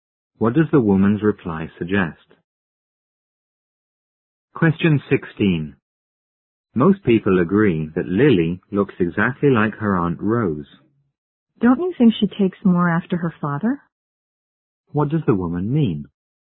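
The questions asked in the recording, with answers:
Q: What does the woman mean?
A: She thinks Lily looks more like her father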